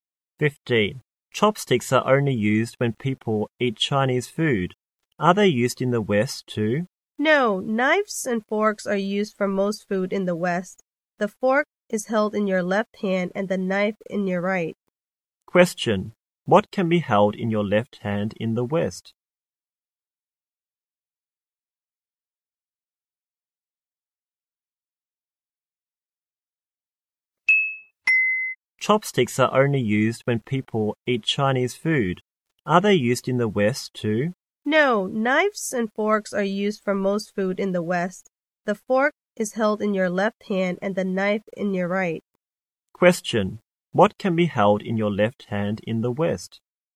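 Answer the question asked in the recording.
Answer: The fork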